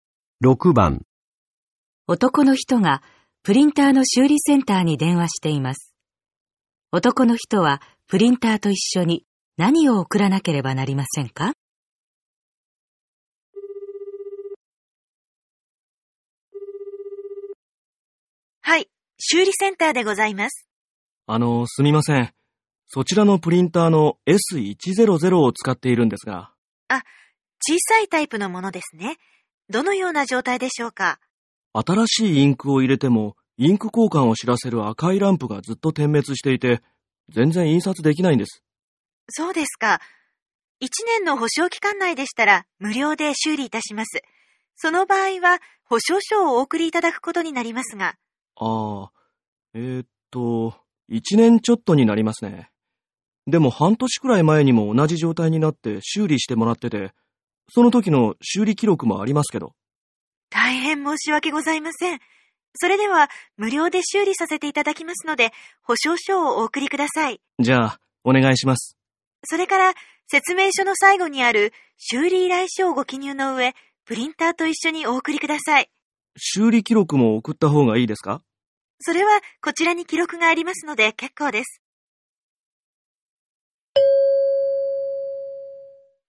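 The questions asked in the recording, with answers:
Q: 男の人はプリンターと一緒に何を送らなければなりませんか?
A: 保証書と修理依頼書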